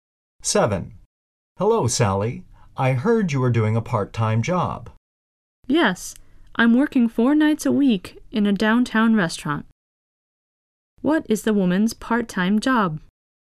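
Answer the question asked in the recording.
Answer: She works 4 nights a week in a downtown restaurant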